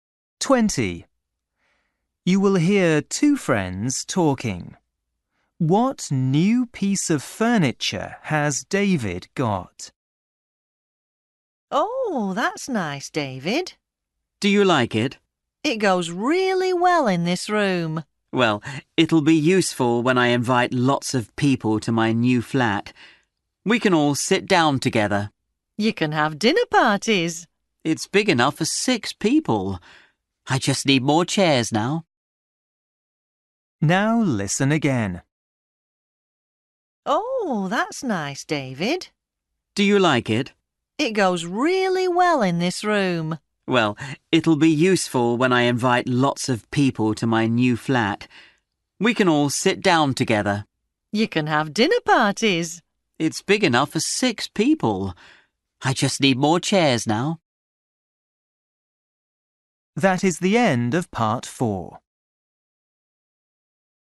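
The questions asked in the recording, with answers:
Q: What new piece of furniture has David got?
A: a table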